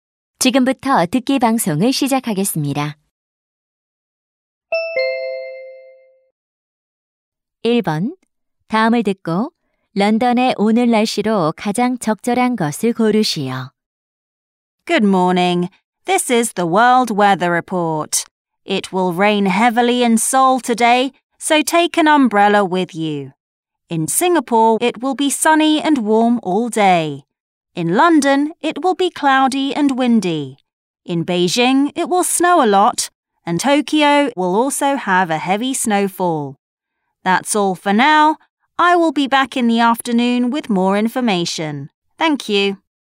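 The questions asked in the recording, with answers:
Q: 다음을 듣고 런던의 오늘 날씨로 가장 적절한 것을 고르시오.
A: 흐리고 바람이 붊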